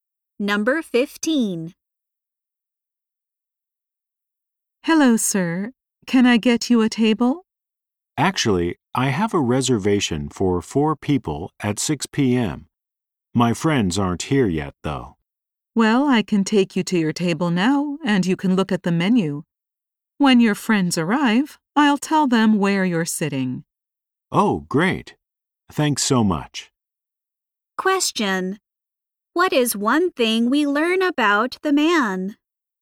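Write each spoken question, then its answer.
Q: What is one thing we learn about the man?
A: He has a reservation for four people at 6 p.m.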